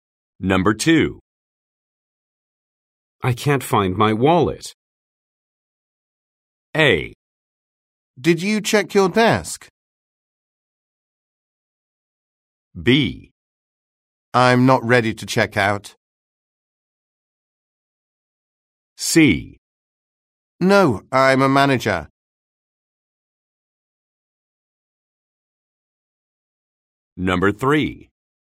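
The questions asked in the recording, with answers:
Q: I can't find my wallet.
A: A: Did you check your desk?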